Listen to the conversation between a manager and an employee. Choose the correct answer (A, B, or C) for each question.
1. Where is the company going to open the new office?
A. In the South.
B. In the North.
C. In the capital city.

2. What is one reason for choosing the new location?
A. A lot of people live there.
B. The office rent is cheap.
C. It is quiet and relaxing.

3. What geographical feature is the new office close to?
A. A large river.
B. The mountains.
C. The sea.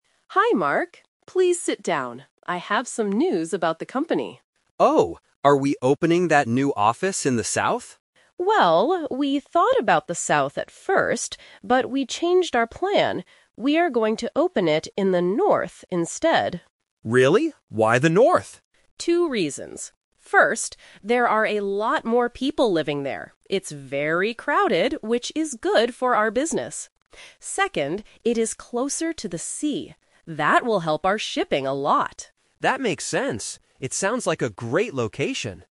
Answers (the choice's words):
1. In the North.
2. A lot of people live there.
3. The sea.

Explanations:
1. Why B is correct: The manager clearly states, "We are going to open it in the North instead." Why A is a trap: The South is mentioned first by the employee, and the manager admits they "thought about the South at first," but they changed their plan. Why C is wrong: The capital city is not mentioned in the audio at all.
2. Why A is correct: The manager gives this as the first reason: "...there are a lot more people living there. It's very crowded..." Why B is wrong: The cost of the office (rent) is a logical business reason, but it is never mentioned in the conversation. Why C is a trap (Opposite): The manager says the area is "crowded," which means it is full of people, not quiet and relaxing.
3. Why C is correct: The manager gives this as the second reason: "Second, it is closer to the sea." Why A & B are wrong: A river and mountains are both plausible geographical features, but they are not mentioned in the audio.

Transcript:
Manager: Hi, Mark. Please sit down. I have some news about the company.
Employee: Oh? Are we opening that new office in the South?
Manager: Well, we thought about the South at first, but we changed our plan. We are going to open it in the North instead.
Employee: Really? Why the North?
Manager: Two reasons. First, there are a lot more people living there. It's very crowded, which is good for our business. Second, it is closer to the sea. That will help our shipping a lot.